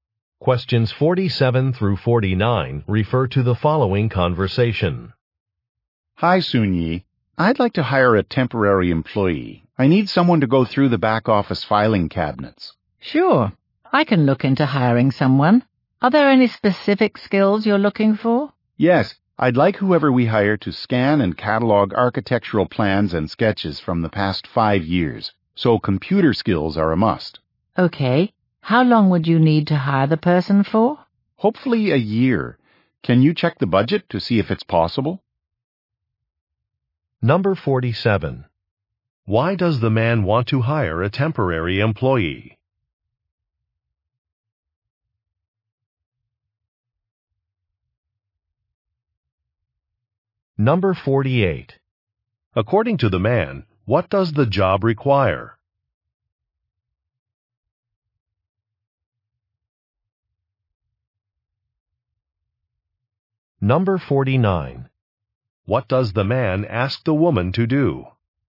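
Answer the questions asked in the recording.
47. To go through the back office filing cabinets (scan and catalog plans)
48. Computer skills
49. Check the budget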